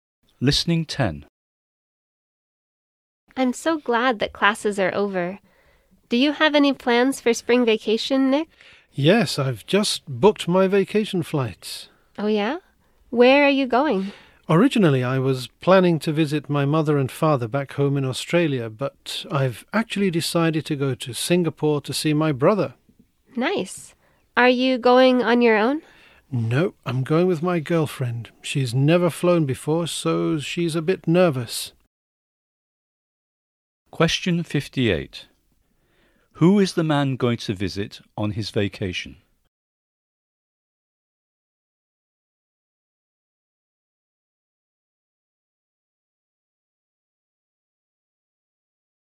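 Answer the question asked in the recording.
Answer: His brother in Singapore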